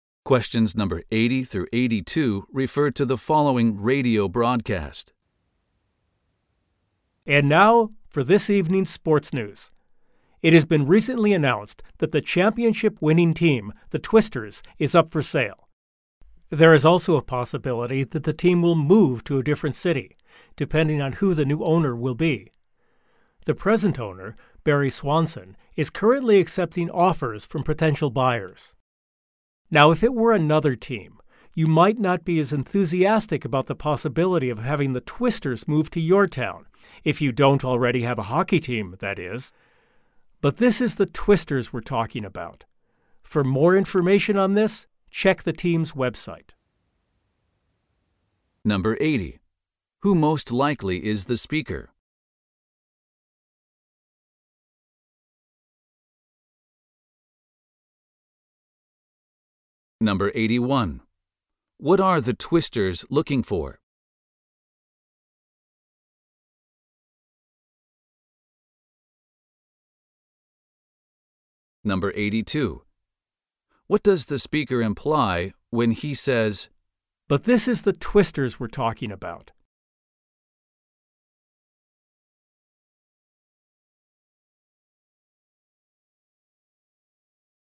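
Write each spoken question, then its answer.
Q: Who most likely is the speaker?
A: A radio sports news announcer

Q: What are the Twisters looking for?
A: A new owner (buyer)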